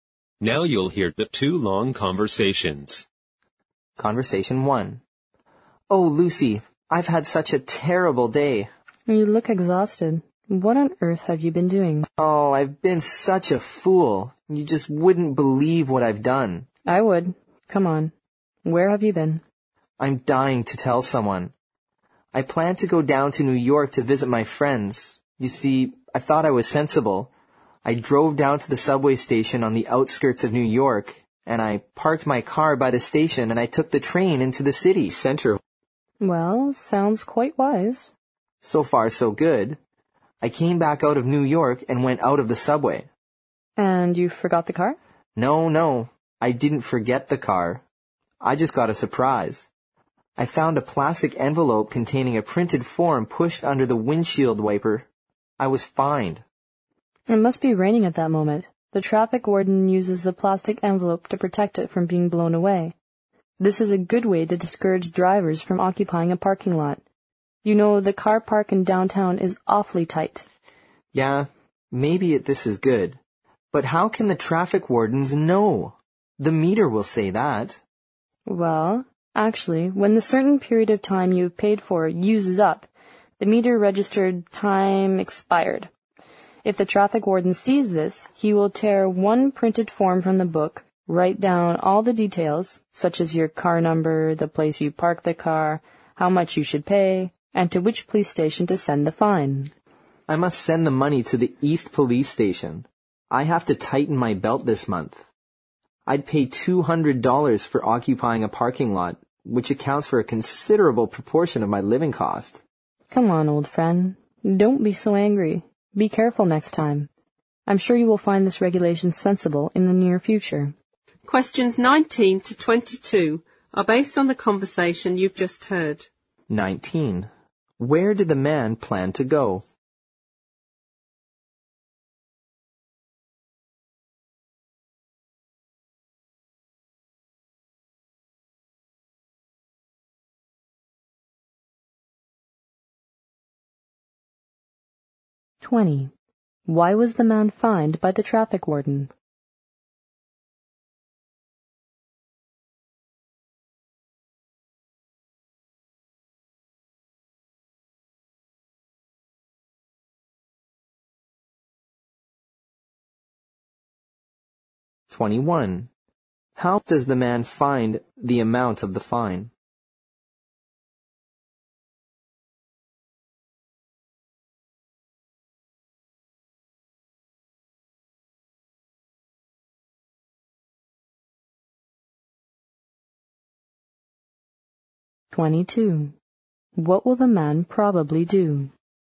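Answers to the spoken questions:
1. New York, to visit his friends
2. His parking time had expired on the meter
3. Too much; $200 is a large part of his living costs
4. Send the $200 fine to the East Police Station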